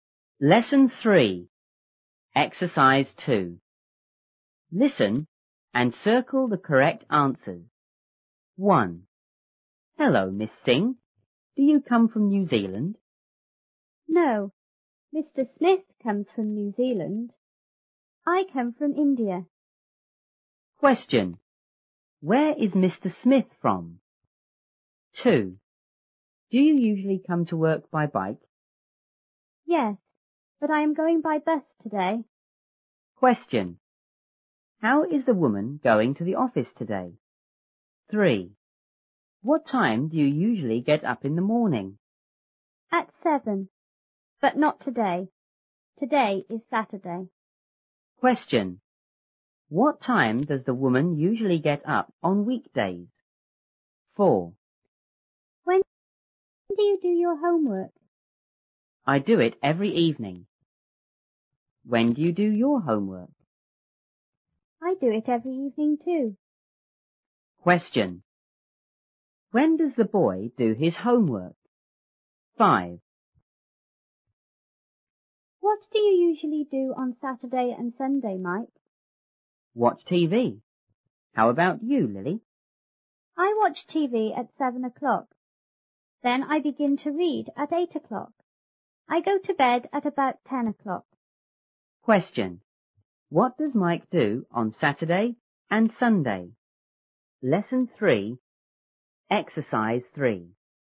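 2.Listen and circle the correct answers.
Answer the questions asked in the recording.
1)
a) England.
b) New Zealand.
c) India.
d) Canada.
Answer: b) New Zealand.
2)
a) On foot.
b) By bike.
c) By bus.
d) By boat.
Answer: c) By bus.
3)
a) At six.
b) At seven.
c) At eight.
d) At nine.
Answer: b) At seven.
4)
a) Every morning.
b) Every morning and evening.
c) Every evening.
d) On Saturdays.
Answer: c) Every evening.
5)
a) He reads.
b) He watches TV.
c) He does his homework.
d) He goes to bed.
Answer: b) He watches TV.

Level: 初中英语广州版1B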